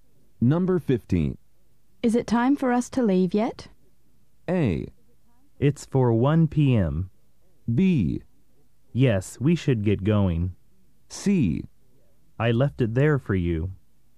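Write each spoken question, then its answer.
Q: Is it time for us to leave yet?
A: B: Yes, we should get going.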